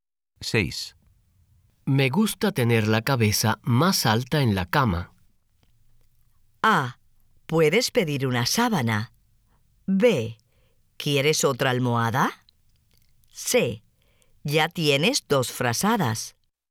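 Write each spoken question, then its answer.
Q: Me gusta tener la cabeza más alta en la cama.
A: B: ¿Quieres otra almohada?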